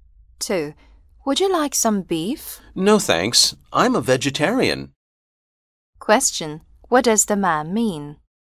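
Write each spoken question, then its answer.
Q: What does the man mean?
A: He doesn't eat meat; he's a vegetarian.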